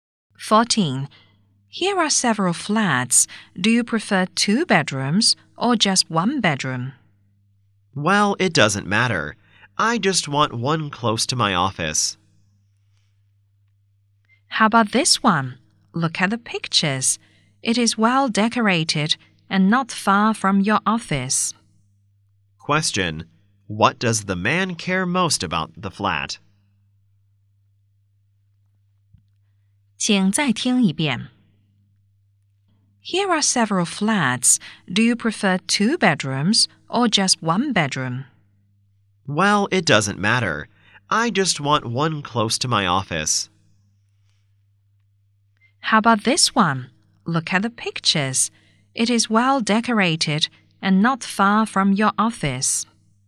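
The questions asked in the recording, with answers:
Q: what does the man care most about the flat?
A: Being close to his office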